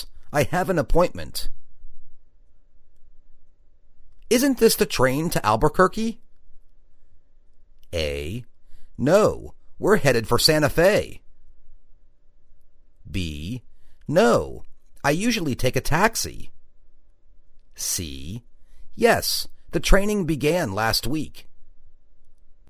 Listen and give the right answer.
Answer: No, we're headed for Santa Fe.